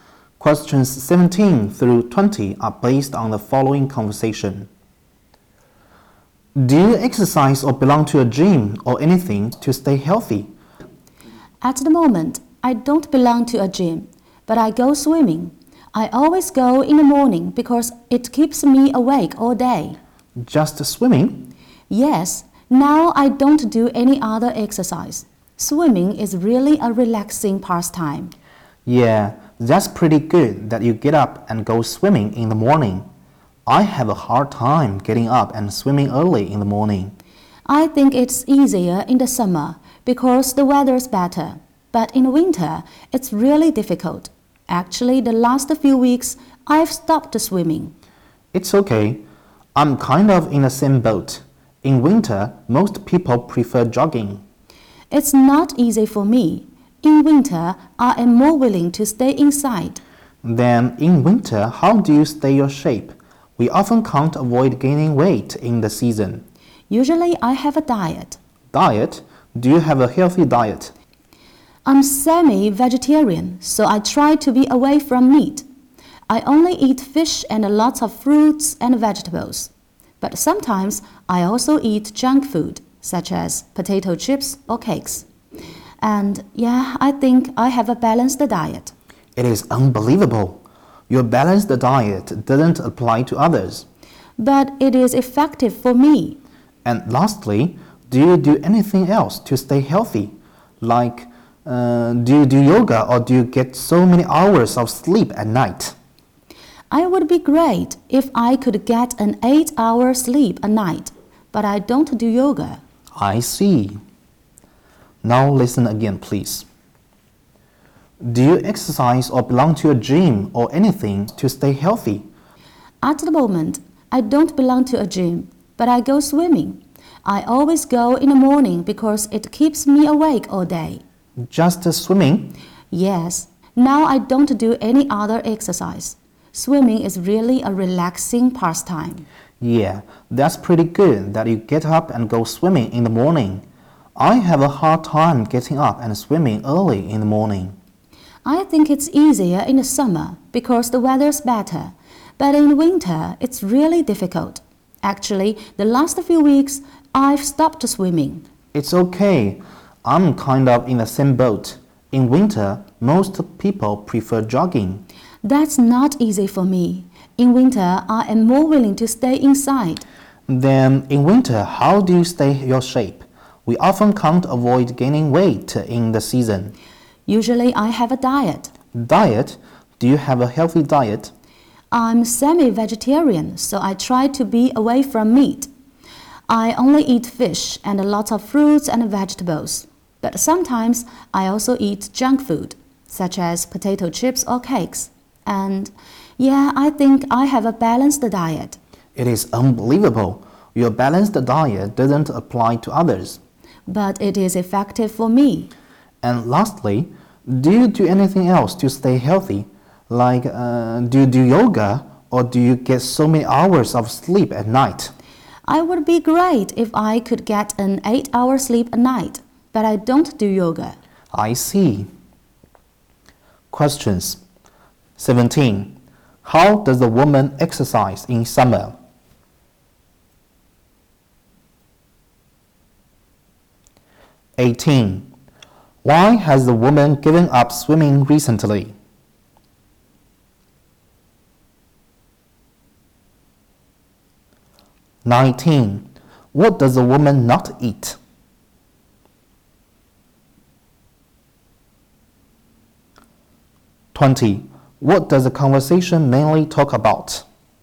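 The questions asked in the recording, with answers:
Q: How does a woman exercise in summer?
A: She goes swimming in the morning

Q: Why has the woman given up swimming recently?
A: Because it's winter and it's hard to get up early in the cold weather

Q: What does a woman not eat?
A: Meat

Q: What does the conversation mainly talk about?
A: Ways to stay healthy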